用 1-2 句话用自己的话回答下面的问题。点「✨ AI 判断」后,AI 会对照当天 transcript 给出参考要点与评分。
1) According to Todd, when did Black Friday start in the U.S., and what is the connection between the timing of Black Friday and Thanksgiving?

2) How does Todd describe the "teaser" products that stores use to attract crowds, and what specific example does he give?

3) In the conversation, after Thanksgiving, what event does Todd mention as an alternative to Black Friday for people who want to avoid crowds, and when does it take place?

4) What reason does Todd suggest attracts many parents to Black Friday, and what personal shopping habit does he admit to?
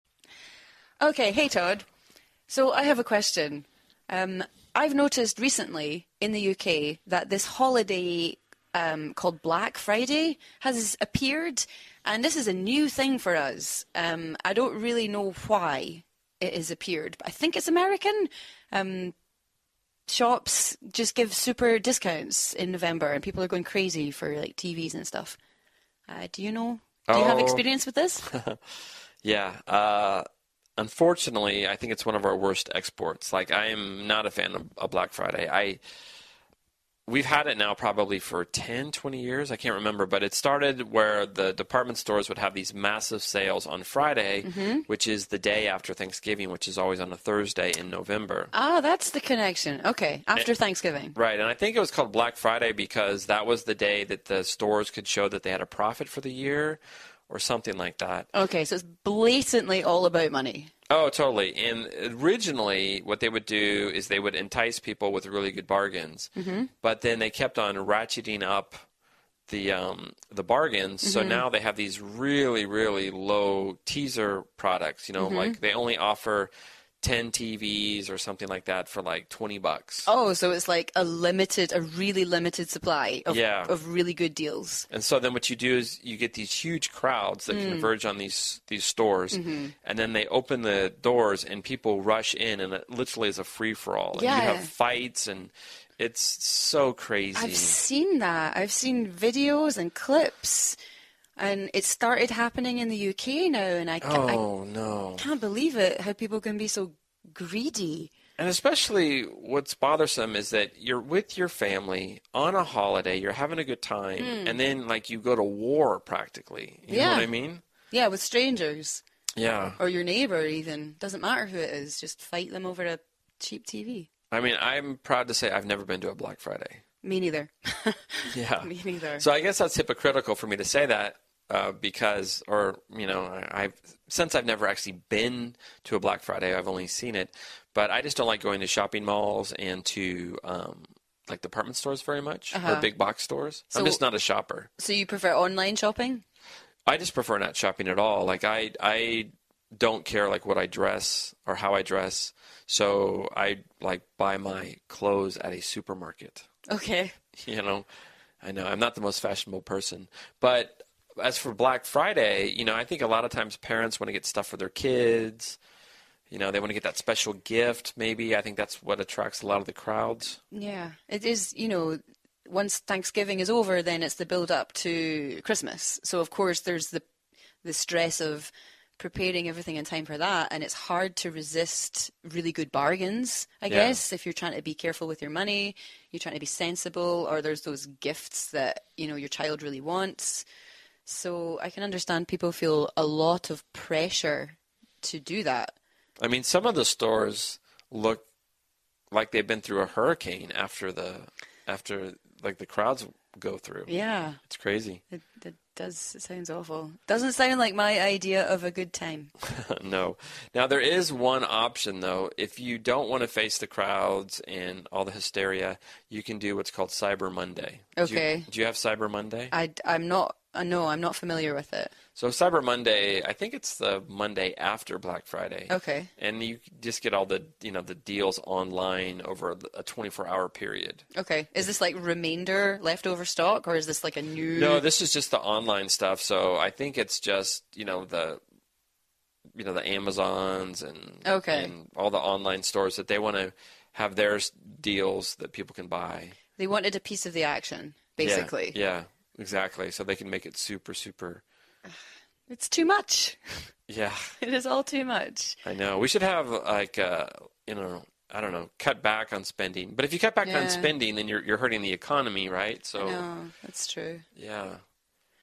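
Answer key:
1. Probably 10 or 20 years ago; it is the Friday after Thanksgiving, which is always on a Thursday in November.
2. Very cheap products in very limited supply, e.g. only ten TVs for about twenty dollars.
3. Cyber Monday, the Monday after Black Friday, with online deals over 24 hours.
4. Parents want to get special gifts for their kids; he prefers not shopping at all and buys his clothes at a supermarket.

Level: CEFRB2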